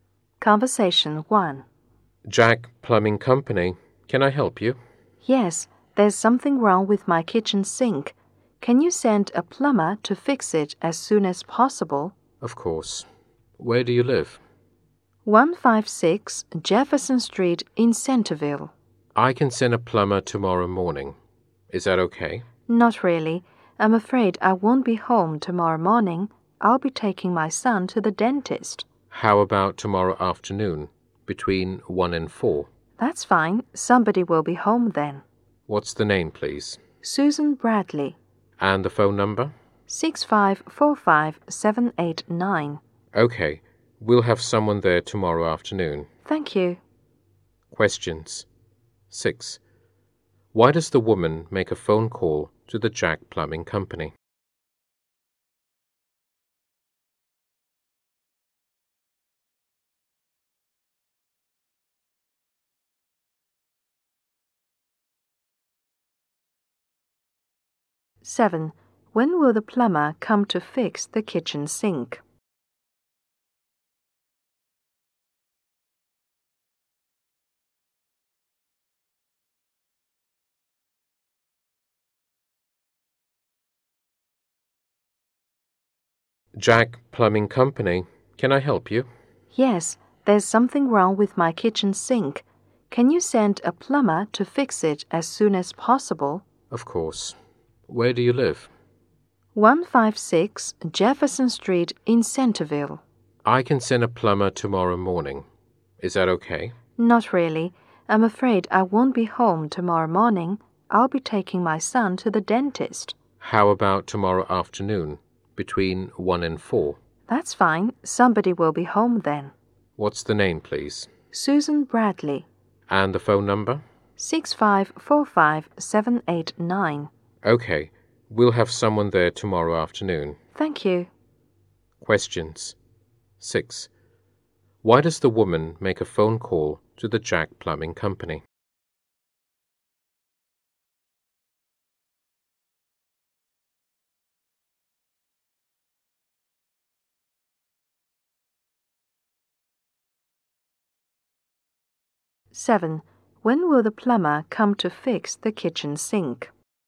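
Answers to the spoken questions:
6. Something is wrong with her kitchen sink
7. Tomorrow afternoon, between 1 and 4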